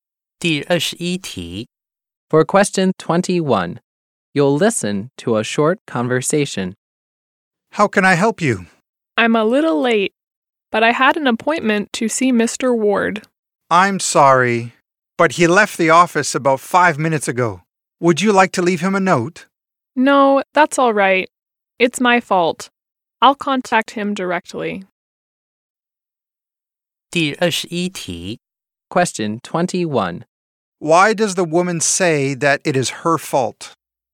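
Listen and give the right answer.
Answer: She arrived late for her appointment, so Mr. Ward had already left.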